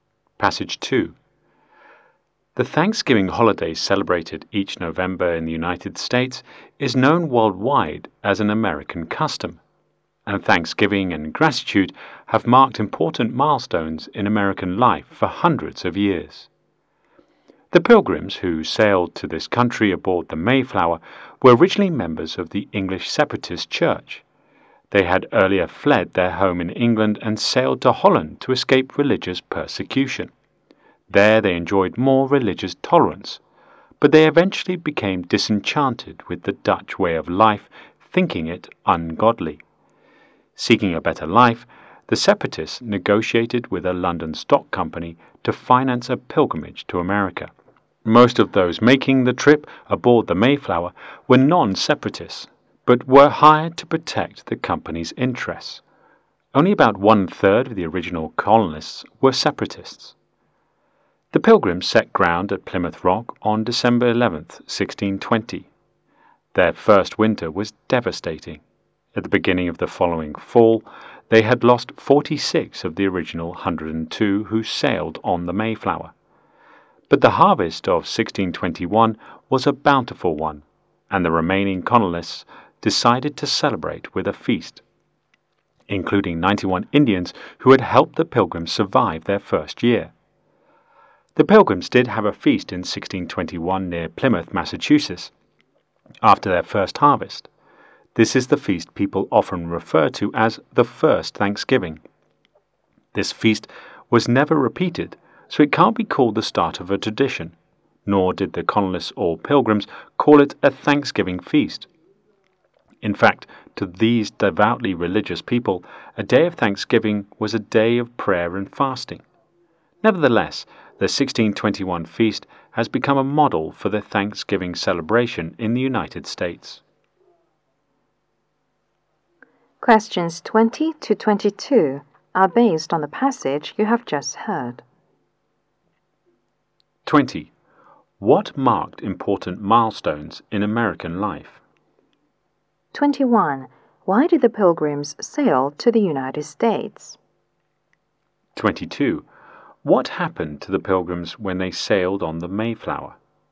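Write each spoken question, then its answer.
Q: What marked important milestones in American life?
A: Thanksgiving and gratitude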